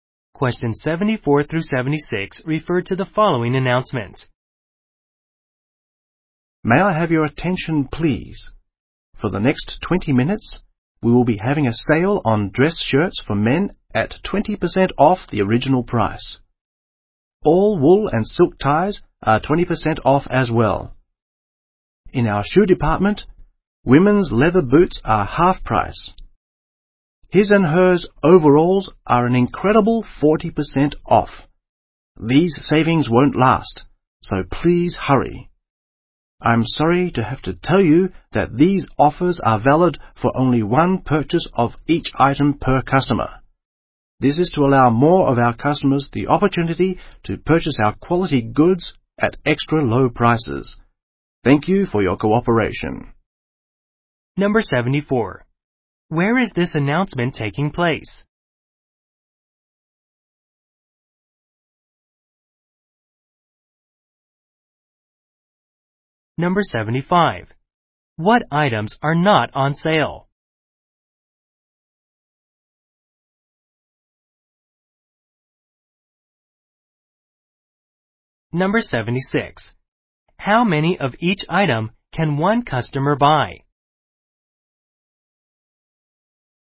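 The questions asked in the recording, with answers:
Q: Where is this announcement taking place?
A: In a clothing/department store

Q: How many of each item can one customer buy?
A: One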